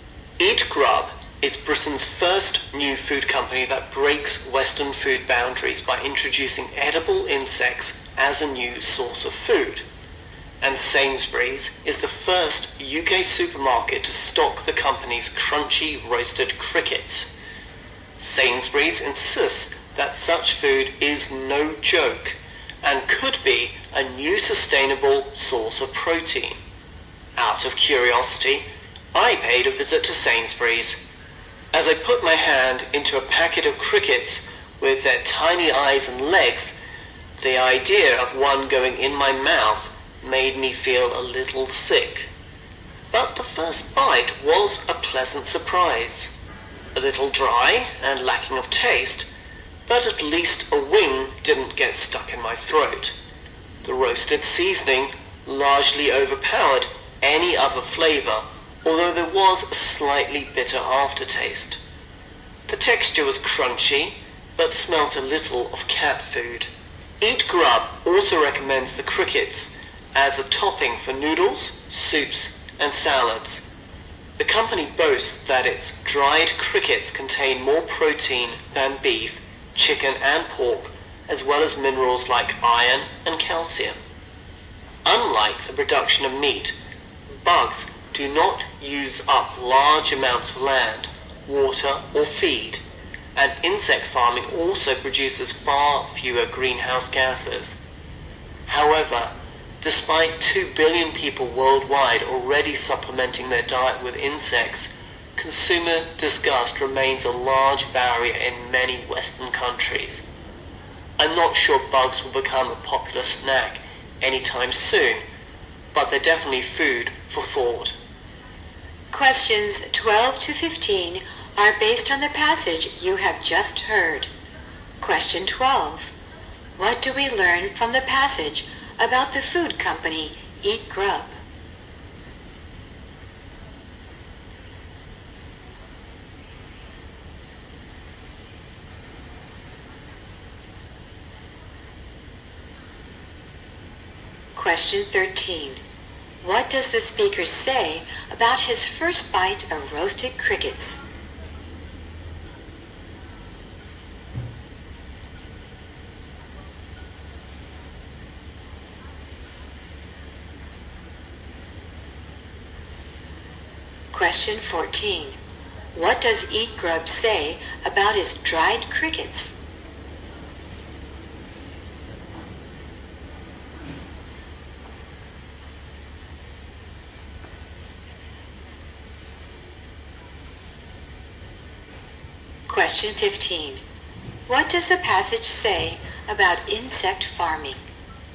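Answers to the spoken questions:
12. It is Britain's first company to introduce edible insects as a new source of food.
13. It was a pleasant surprise, though a little dry and lacking in taste.
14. They contain more protein than beef, chicken and pork.
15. It produces far fewer greenhouse gases.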